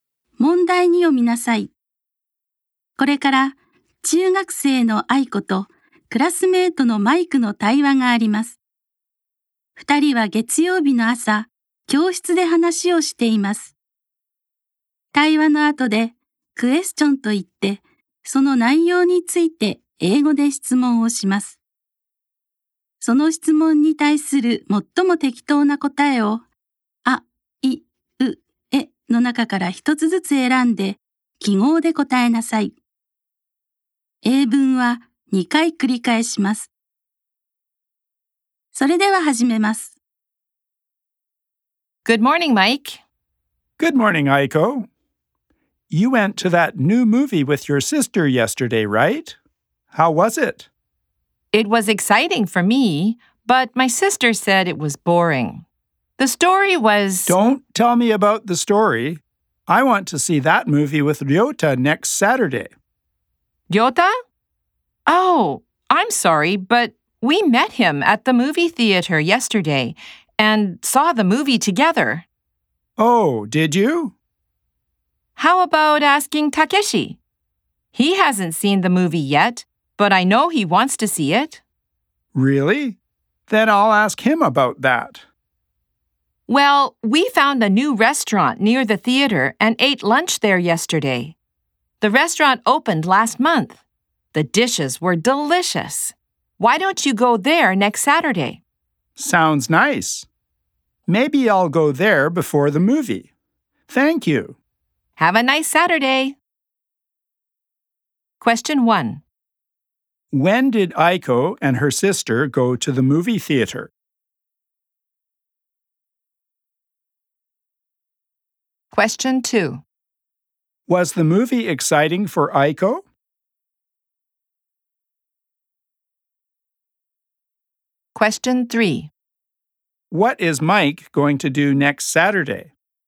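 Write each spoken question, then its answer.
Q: When did Aiko and her sister go to the movie theater?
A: Yesterday (Sunday).

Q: Was the movie exciting for Aiko?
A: Yes, it was.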